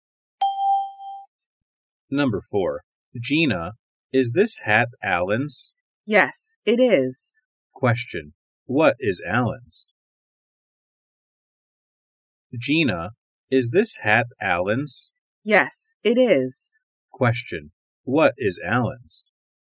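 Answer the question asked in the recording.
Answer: The hat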